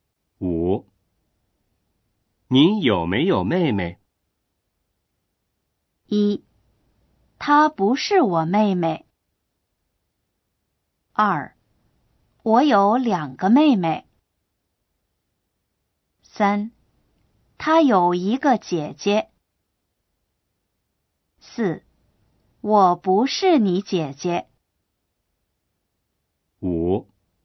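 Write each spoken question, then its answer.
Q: 您有没有妹妹?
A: 2: 我有两个妹妹。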